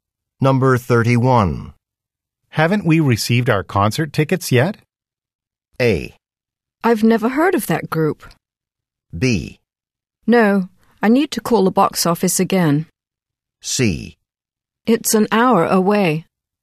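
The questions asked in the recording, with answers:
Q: Haven't we received our concert tickets yet?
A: B: No, I need to call the box office again.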